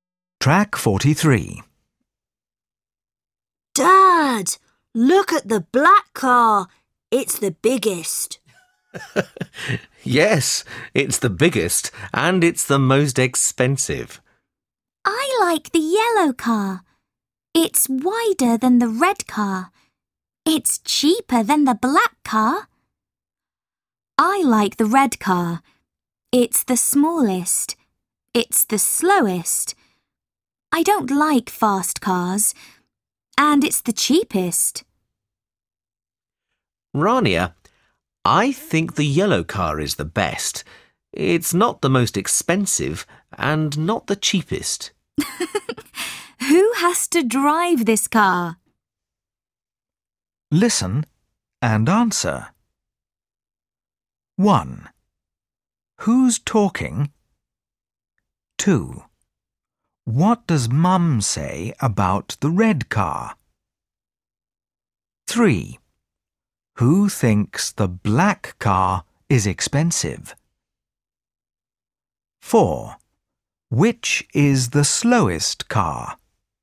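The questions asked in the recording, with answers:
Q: Which is the slowest car?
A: The red car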